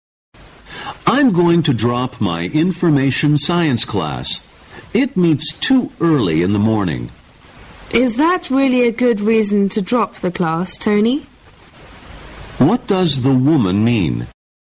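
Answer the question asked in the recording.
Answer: Tony's reason for dropping the class is not a good one.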